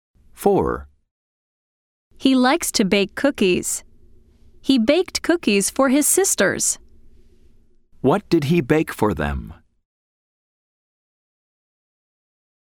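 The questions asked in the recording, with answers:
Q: What did he bake for them?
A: cookies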